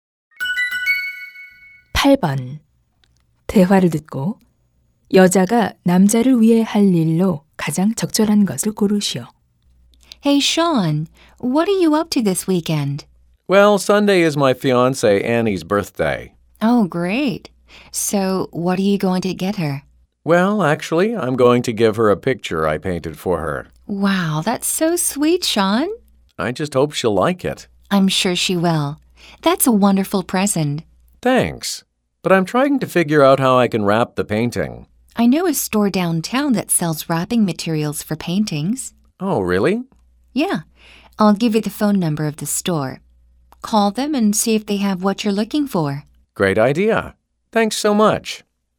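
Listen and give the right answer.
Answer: 포장 재료 가게의 전화번호 알려 주기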